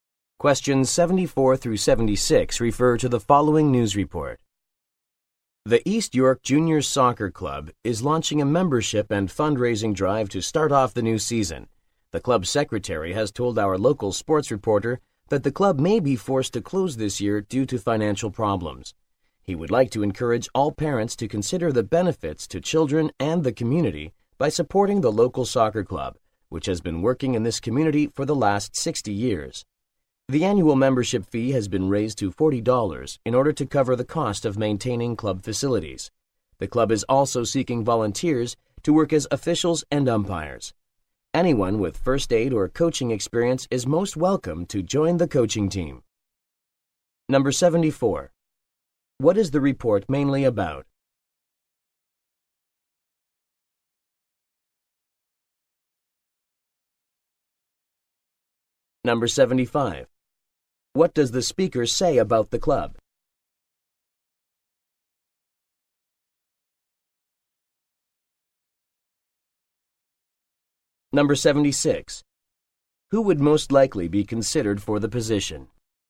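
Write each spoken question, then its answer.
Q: What is the report mainly about?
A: A soccer club's membership and fundraising drive

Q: Who would most likely be considered for the position?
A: Someone with first aid or coaching experience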